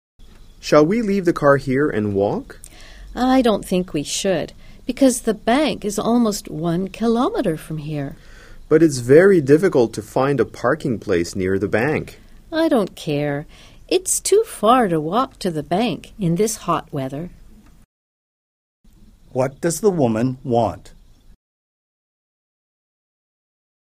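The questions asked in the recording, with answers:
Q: What does the woman want?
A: To drive to the bank rather than walk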